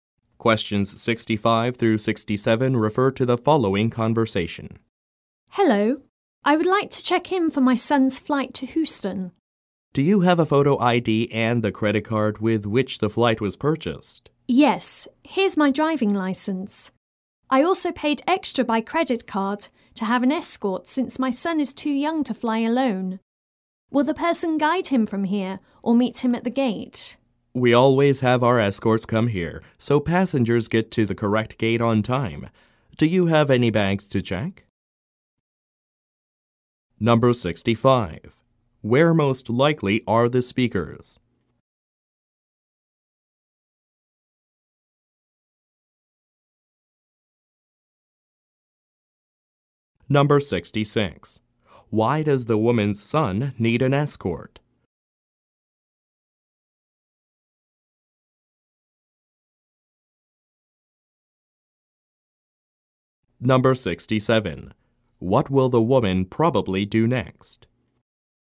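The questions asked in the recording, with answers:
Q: Where most likely are the speakers?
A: At an airport check-in counter

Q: Why does the woman's son need an escort?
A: He is too young to fly alone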